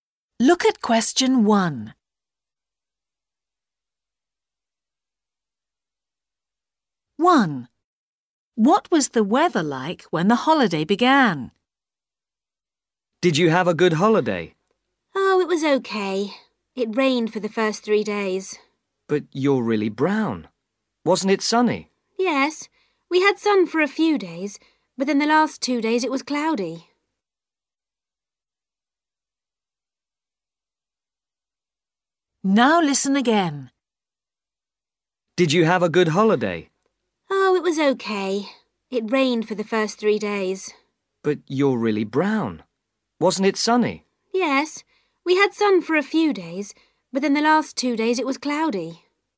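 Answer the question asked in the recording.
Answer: It rained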